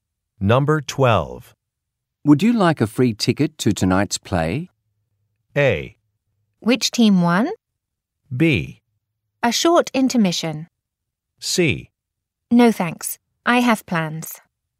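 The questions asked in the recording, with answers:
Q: Would you like a free ticket to tonight's play?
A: C: No thanks, I have plans.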